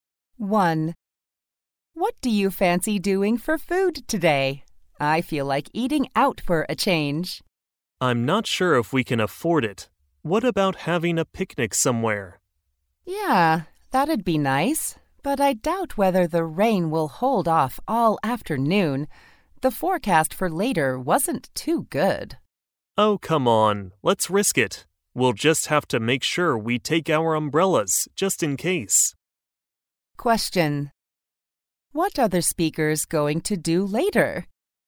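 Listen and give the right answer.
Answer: Have a picnic, taking umbrellas in case it rains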